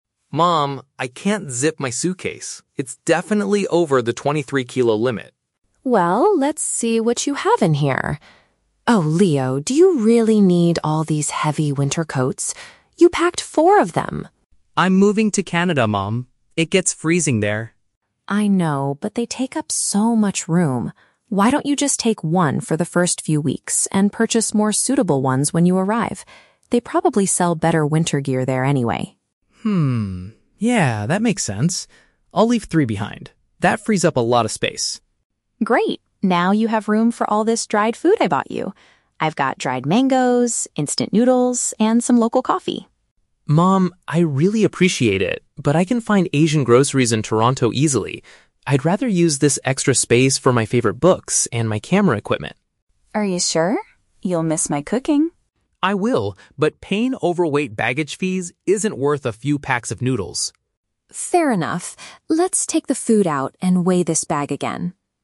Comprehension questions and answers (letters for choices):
Listen to the conversation between a mother and her son. Read the questions below and choose the correct answer (A, B, or C) for each.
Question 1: Why is the man's suitcase currently overweight?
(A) He packed too much cold-weather clothing.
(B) He put all of his books and camera equipment inside.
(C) His mother secretly added lots of heavy snacks.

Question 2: What do they decide to do about the winter jackets?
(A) Bring all of them because the destination is extremely cold.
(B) Leave them all at home and get new ones abroad.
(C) Pack a single coat and buy the rest after arriving.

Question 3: Why does the man refuse to take the dried food?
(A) He dislikes the taste of instant noodles and dried mangoes.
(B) He wants to avoid extra airline charges for heavy bags.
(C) He believes Canadian food will be much healthier for him.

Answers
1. A
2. C
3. B

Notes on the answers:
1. The Key (Correct): The mother points out that he packed four "heavy winter coats" (paraphrased in the option as "cold-weather clothing"), which is making the bag impossible to zip. The Trap: Option (B) is incorrect because he wants to put his books and camera equipment in the extra space later, but they are not the reason the bag is currently overweight. Not mentioned: Option (C) is plausible in a real-life scenario, but the mother only suggests adding the snacks after he removes the coats.
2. The Key (Correct): The mother suggests he "take one for the first few weeks, and purchase more suitable ones when you arrive," and Leo agrees to "leave three behind." The Trap: Option (A) was Leo's original intention, but he changed his mind. Option (B) is a distractor because he does not leave all of them at home; he takes exactly one.
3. The Key (Correct): Leo explicitly states that "paying overweight baggage fees isn't worth a few packs of noodles." "Overweight baggage fees" is paraphrased as "extra airline charges." The Trap: Option (A) is incorrect. He never says he dislikes the food; in fact, he says "I really appreciate it." Not mentioned: Option (C) is plausible for a health-conscious student, but health or the quality of Canadian food is never discussed.

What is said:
Leo: Mom, I can't zip my suitcase. It's definitely over the 23-kilo limit!
Mom: Well, let's see what you have in here. Oh, Leo, do you really need all these heavy winter coats? You packed four of them!
Leo: I'm moving to Canada, Mom. It gets freezing there.
Mom: I know, but they take up so much room. Why don't you just take one for the first few weeks, and purchase more suitable ones when you arrive? They probably sell better winter gear there anyway.
Leo: Hmm, yeah, that makes sense. I'll leave three behind. That frees up a lot of space.
Mom: Great. Now you have room for all this dried food I bought you! I've got dried mangoes, instant noodles, and some local coffee.
Leo: Mom, I really appreciate it, but I can find Asian groceries in Toronto easily. I'd rather use this extra space for my favorite books and my camera equipment.
Mom: Are you sure? You'll miss my cooking!
Leo: I will, but paying overweight baggage fees isn't worth a few packs of noodles.
Mom: Fair enough. Let's take the food out and weigh this bag again.